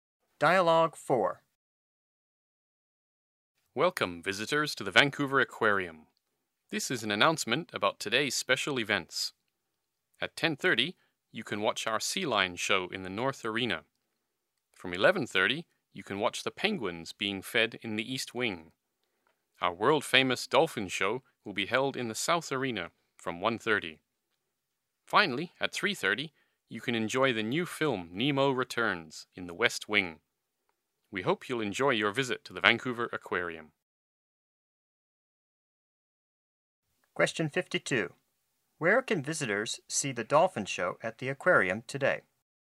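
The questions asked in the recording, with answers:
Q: Where can visitors see the dolphin show at the aquarium today?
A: In the South Arena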